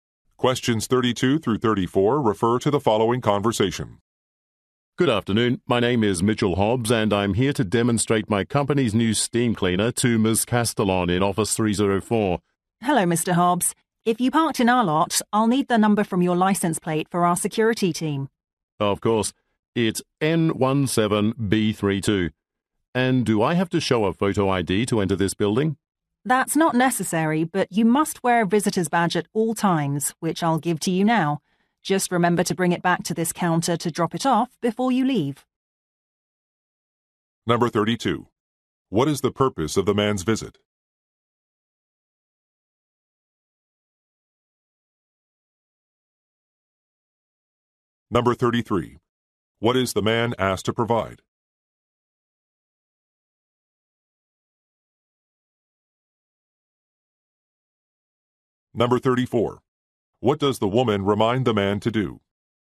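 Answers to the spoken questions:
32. To demonstrate a new steam cleaner
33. His license plate number
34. Return the visitor's badge before leaving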